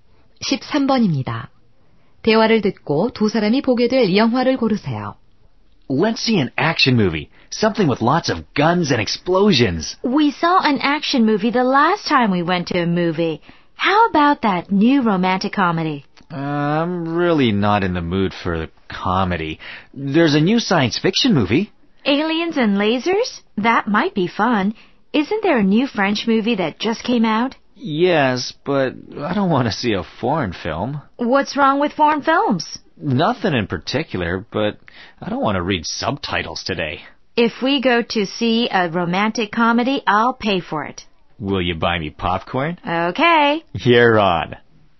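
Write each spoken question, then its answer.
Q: 대화를 듣고 두 사람이 보게 될 영화를 고르세요.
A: 로맨틱 코미디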